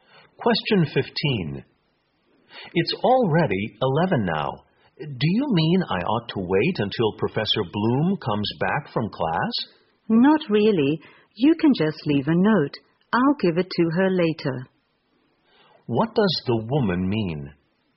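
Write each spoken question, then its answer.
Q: What does the woman mean?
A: He doesn't need to wait for Professor Bloom; he can just leave a note and she'll give it to her.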